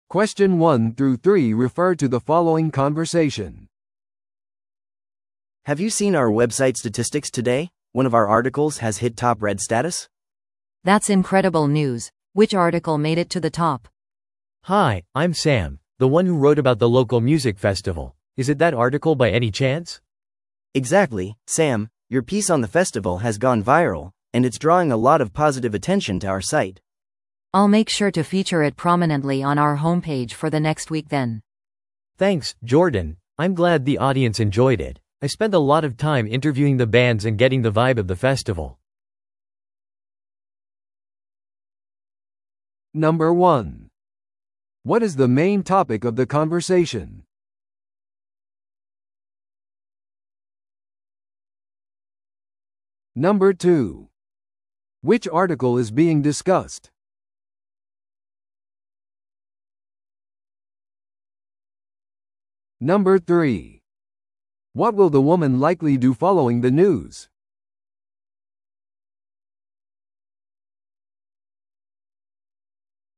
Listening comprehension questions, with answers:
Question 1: What is the main topic of the conversation?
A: 記事の成功を祝う。

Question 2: Which article is being discussed?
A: ローカルミュージックフェスティバルのレポート。

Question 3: What will the woman likely do following the news?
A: ホームページで記事を宣伝する。

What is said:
A: Have you seen our website statistics today? One of our articles has hit top-read status!
B: That's incredible news! Which article made it to the top?
C: Hi, I'm Sam, the one who wrote about the local music festival. Is it that article by any chance?
A: Exactly, Sam! Your piece on the festival has gone viral, and it's drawing a lot of positive attention to our site.
B: I'll make sure to feature it prominently on our homepage for the next week then!
C: Thanks, Jordan! I'm glad the audience enjoyed it. I spent a lot of time interviewing the bands and getting the vibe of the festival.